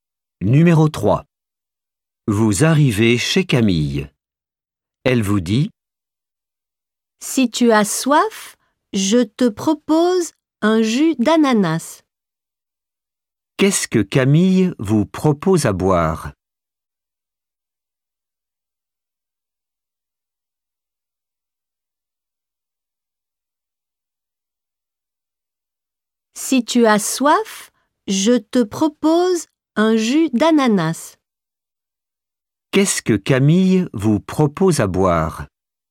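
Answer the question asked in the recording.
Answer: Un jus d'ananas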